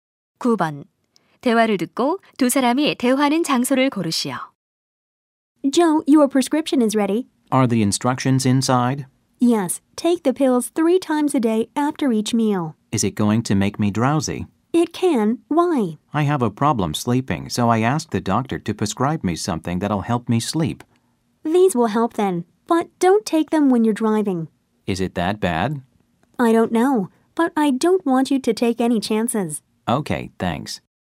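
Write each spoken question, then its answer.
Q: 대화를 듣고 두 사람이 대화하는 장소를 고르시오.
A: 약국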